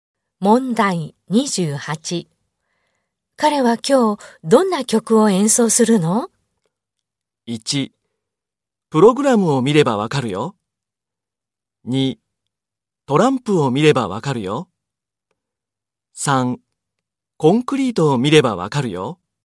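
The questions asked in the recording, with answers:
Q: 彼は今日どんな曲を演奏するの?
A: 1: プログラムを見ればわかるよ。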